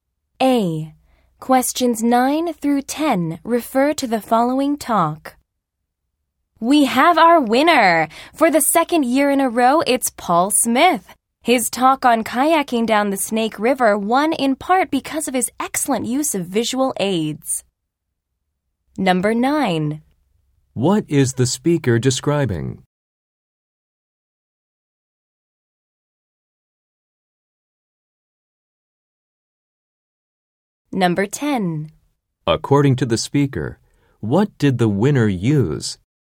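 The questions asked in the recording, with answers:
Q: According to the speaker, what did the winner use?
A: Excellent visual aids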